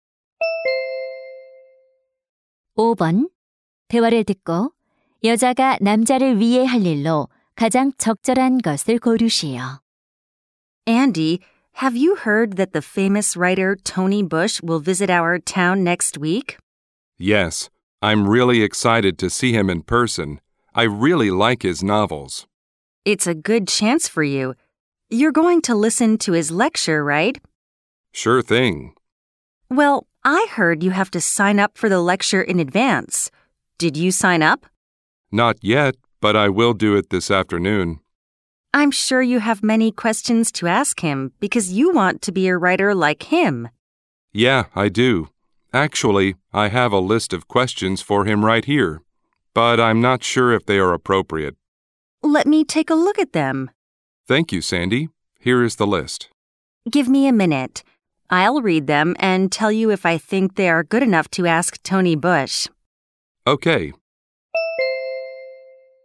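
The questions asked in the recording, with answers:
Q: 대화를 듣고 여자가 남자를 위해 할 일로 가장 적절한 것을 고르시오.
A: 질문 목록 검토해 주기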